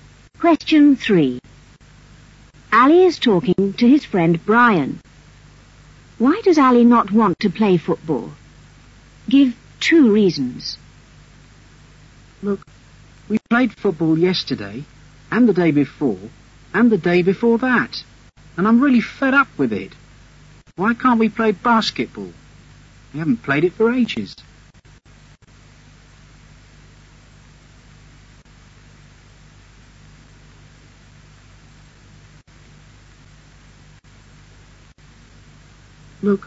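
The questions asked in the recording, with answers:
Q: Why does Ali not want to play football?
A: He is fed up with it because they played it for several days running, and they haven't played basketball for ages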